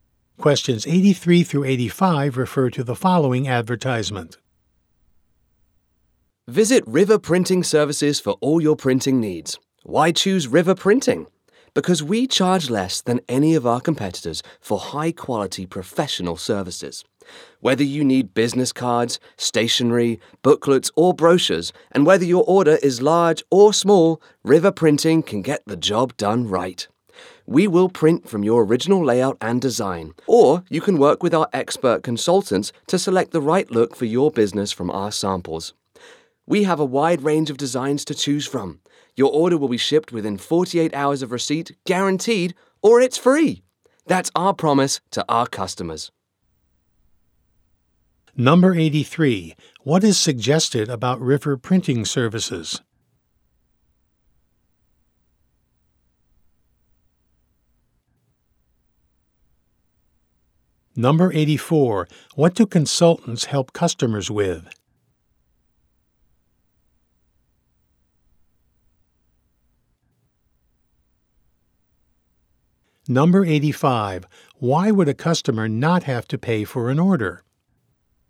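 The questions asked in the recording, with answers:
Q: What is suggested about River Printing Services?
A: It charges less than its competitors

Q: What do consultants help customers with?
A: Choosing the right design from samples

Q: Why would a customer not have to pay for an order?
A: If it isn't shipped within 48 hours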